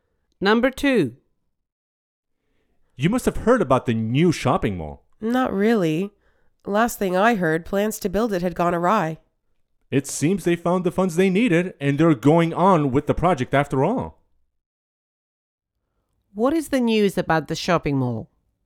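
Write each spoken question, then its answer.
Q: What is the news about the shopping mall?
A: Funds were found and the project is going ahead.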